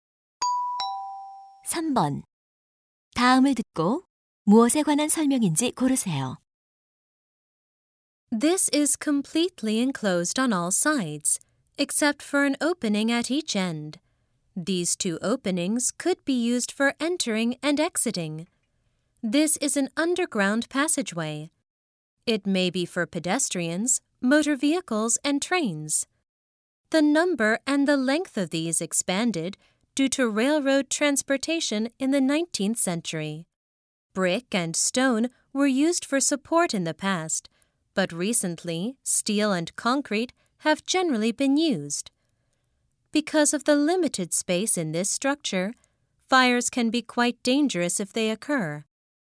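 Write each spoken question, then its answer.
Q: 다음을 듣고 무엇에 관한 설명인지 고르세요.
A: 터널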